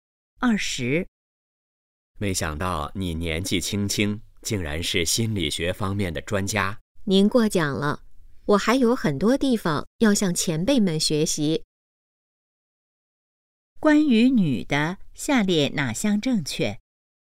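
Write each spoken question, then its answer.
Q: 关于女的,下列哪项正确?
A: 她是心理学方面的专家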